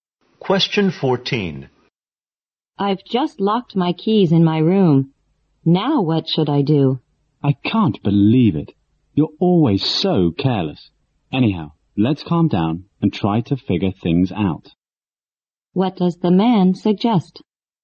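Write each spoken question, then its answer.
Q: What does the man suggest?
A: Calm down and figure out what to do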